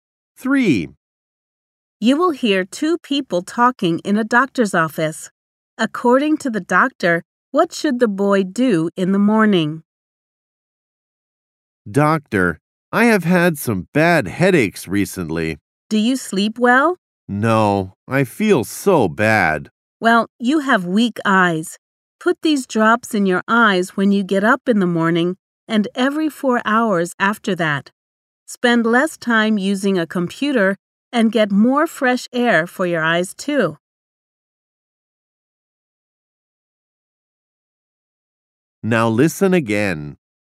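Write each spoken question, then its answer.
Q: According to the doctor, what should the boy do in the morning?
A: Put drops in his eyes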